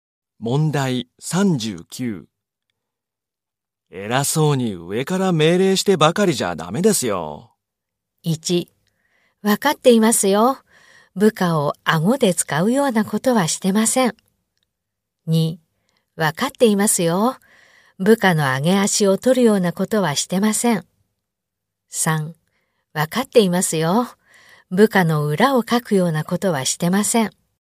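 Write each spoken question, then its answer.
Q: 偉そうに上から命令してばかりじゃダメですよ。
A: 1: わかっていますよ。部下を顎で使うようなことはしてません。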